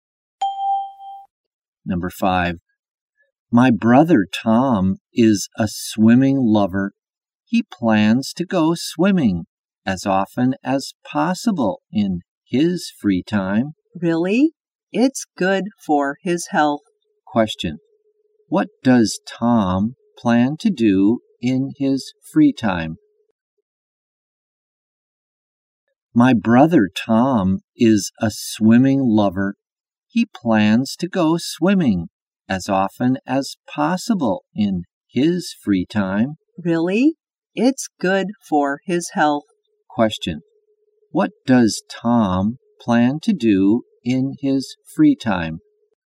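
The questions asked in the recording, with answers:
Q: What does Tom plan to do in his free time?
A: Go swimming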